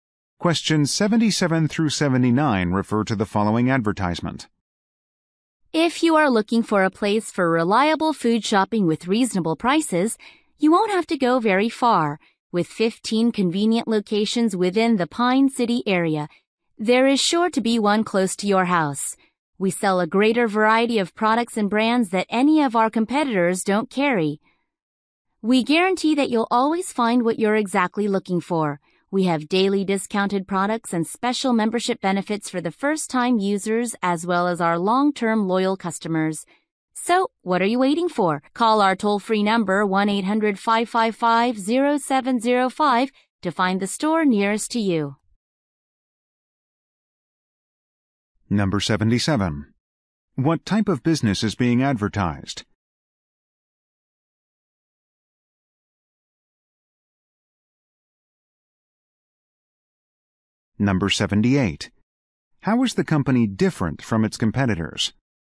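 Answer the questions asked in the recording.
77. A grocery store chain
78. It carries a greater variety of products and brands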